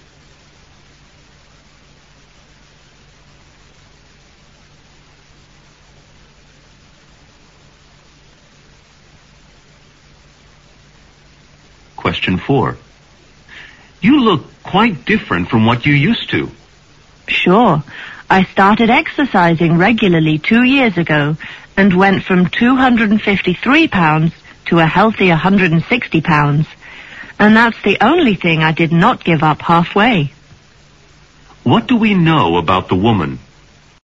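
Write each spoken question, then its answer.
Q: What do we know about the woman?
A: She lost a lot of weight by exercising regularly for 2 years.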